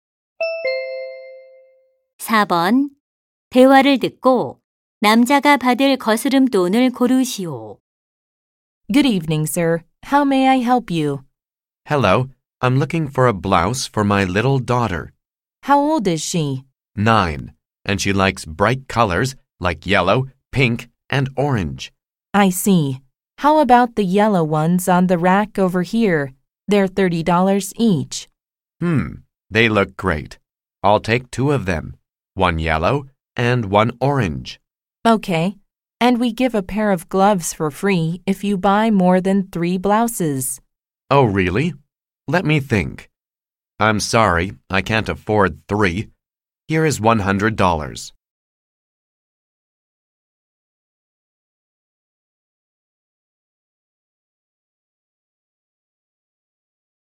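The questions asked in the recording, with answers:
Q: 대화를 듣고 남자가 받을 거스름 돈을 고르시오.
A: 40달러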